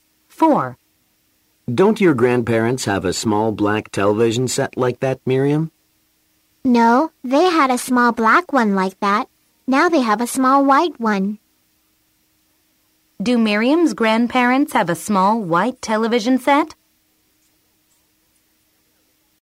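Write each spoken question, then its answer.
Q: Do Miriam's grandparents have a small white television set?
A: Yes, they do.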